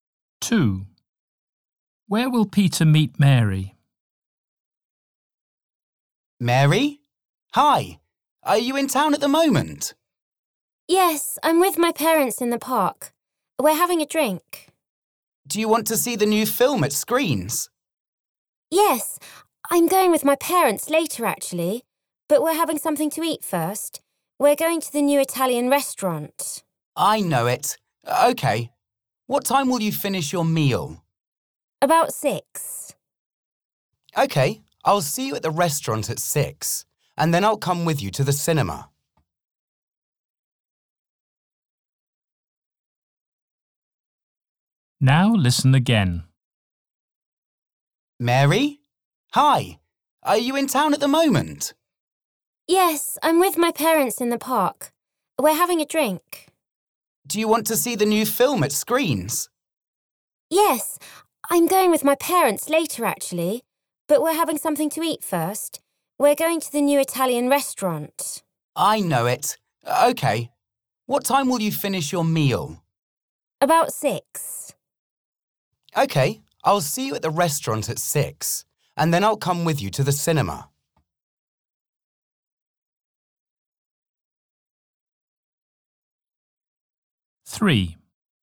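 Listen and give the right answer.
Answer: At the Italian restaurant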